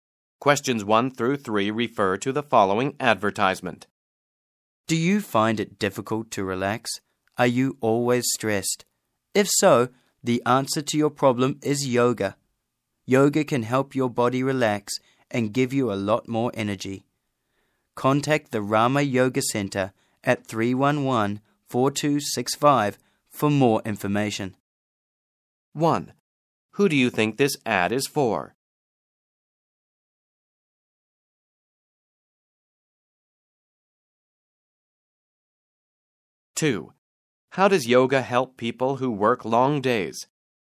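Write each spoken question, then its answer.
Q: Who do you think this ad is for?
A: People who are stressed and find it difficult to relax

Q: How does yoga help people who work long days?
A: It helps their body relax and gives them more energy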